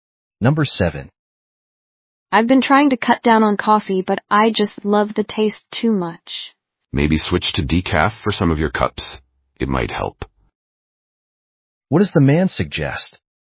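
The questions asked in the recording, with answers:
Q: What does the man suggest?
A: Switch to decaf for some cups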